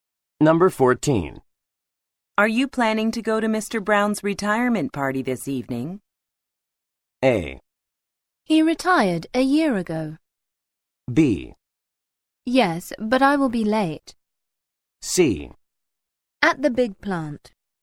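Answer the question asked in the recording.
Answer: B: Yes, but I will be late.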